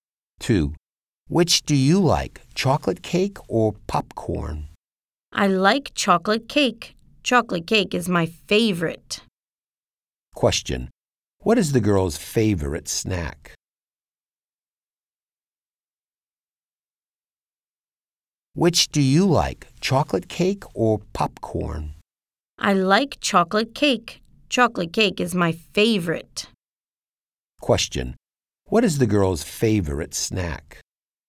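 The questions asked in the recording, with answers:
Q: What is the girl's favorite snack?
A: Chocolate cake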